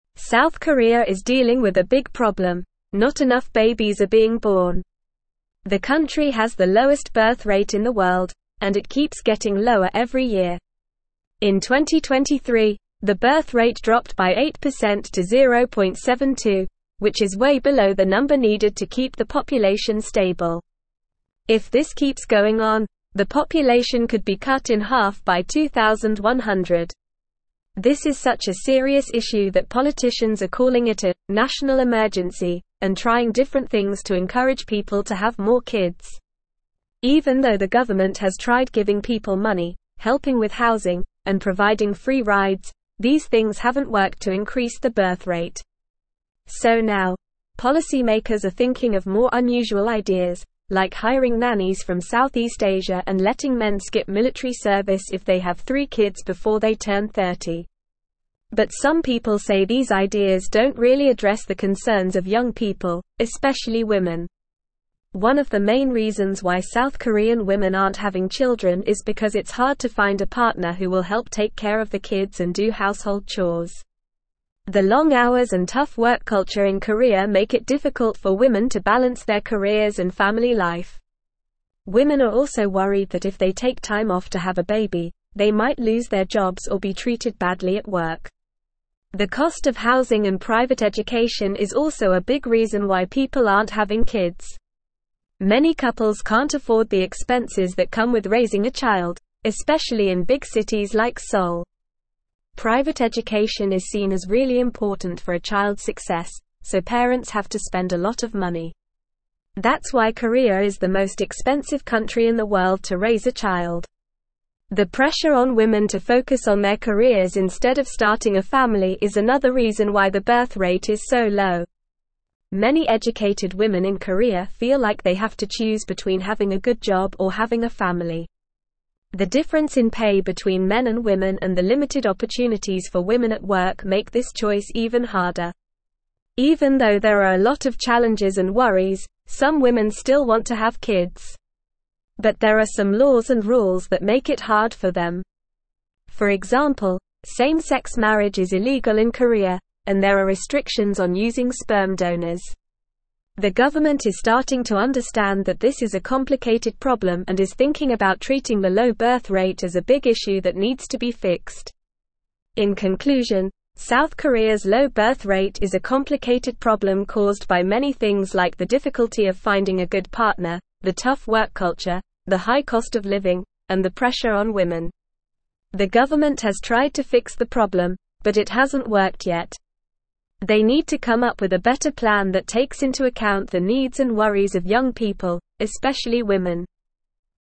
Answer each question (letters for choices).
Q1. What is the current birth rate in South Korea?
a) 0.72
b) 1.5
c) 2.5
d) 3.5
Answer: a

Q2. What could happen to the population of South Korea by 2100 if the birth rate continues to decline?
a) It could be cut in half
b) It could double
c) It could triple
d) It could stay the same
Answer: a

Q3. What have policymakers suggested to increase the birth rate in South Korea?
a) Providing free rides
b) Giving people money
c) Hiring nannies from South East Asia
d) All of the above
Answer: c

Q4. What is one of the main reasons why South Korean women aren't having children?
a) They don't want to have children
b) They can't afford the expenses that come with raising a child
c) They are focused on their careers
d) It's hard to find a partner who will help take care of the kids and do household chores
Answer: d

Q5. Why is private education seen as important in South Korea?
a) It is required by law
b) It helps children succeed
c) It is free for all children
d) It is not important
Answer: b

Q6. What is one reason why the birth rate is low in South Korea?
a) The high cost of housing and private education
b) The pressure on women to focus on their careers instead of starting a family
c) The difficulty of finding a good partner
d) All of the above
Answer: b

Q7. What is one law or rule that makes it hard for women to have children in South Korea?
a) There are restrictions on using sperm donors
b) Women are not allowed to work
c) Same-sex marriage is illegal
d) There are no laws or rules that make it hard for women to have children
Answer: c

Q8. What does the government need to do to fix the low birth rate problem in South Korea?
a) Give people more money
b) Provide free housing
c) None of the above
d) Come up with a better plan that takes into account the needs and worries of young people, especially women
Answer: d

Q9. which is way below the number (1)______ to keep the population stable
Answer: needed

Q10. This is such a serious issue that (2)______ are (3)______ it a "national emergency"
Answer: politicians

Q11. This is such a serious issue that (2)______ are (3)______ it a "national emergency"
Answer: calling

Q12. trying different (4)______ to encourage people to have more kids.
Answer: things

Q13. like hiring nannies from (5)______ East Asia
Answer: South

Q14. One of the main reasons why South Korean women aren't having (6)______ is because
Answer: children

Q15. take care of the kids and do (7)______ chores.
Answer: household

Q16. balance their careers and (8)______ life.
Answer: family

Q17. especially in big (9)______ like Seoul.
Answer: cities

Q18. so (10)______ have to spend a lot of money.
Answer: parents

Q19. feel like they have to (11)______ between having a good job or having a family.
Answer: choose

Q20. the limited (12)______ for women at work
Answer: opportunities

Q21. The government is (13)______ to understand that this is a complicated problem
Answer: starting

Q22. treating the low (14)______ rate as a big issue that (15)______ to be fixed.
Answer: birth

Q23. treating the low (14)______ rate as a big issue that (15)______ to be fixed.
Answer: needs

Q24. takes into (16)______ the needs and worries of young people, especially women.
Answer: account

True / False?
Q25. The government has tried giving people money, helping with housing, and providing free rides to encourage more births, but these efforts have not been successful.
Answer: True

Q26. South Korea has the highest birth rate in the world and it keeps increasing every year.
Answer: False

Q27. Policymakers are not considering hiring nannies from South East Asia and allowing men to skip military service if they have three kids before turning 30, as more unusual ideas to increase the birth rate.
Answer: False

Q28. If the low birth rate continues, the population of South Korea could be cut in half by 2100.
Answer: True

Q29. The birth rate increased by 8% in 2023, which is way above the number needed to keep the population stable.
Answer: False

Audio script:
South Korea is dealing with a big problem: not enough babies are being born. The country has the lowest birth rate in the world, and it keeps getting lower every year. In 2023, the birth rate dropped by 8% to 0.72, which is way below the number needed to keep the population stable. If this keeps going on, the population could be cut in half by 2100. This is such a serious issue that politicians are calling it a "national emergency" and trying different things to encourage people to have more kids.
Even though the government has tried giving people money, helping with housing, and providing free rides, these things haven't worked to increase the birth rate. So now, policymakers are thinking of more unusual ideas, like hiring nannies from South East Asia and letting men skip military service if they have three kids before they turn 30. But some people say these ideas don't really address the concerns of young people, especially women.
One of the main reasons why South Korean women aren't having children is because it's hard to find a partner who will help take care of the kids and do household chores. The long hours and tough work culture in Korea make it difficult for women to balance their careers and family life. Women are also worried that if they take time off to have a baby, they might lose their jobs or be treated badly at work.
The cost of housing and private education is also a big reason why people aren't having kids. Many couples can't afford the expenses that come with raising a child, especially in big cities like Seoul. Private education is seen as really important for a child's success, so parents have to spend a lot of money. That's why Korea is the most expensive country in the world to raise a child.
The pressure on women to focus on their careers instead of starting a family is another reason why the birth rate is so low. Many educated women in Korea feel like they have to choose between having a good job or having a family. The difference in pay between men and women and the limited opportunities for women at work make this choice even harder.
Even though there are a lot of challenges and worries, some women still want to have kids. But there are some laws and rules that make it hard for them. For example, same-sex marriage is illegal in Korea, and there are restrictions on using sperm donors. The government is starting to understand that this is a complicated problem and is thinking about treating the low birth rate as a big issue that needs to be fixed.
In conclusion, South Korea's low birth rate is a complicated problem caused by many things like the difficulty of finding a good partner, the tough work culture, the high cost of living, and the pressure on women. The government has tried to fix the problem, but it hasn't worked yet. They need to come up with a better plan that takes into account the needs and worries of young people, especially women.

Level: Level 3